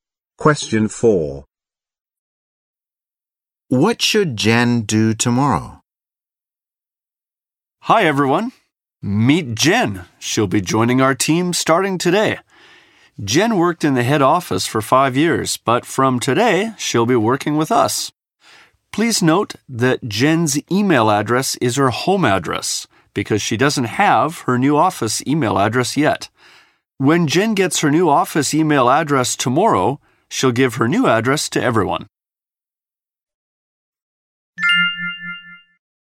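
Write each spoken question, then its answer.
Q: What should Jen do tomorrow?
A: Give everyone her new office email address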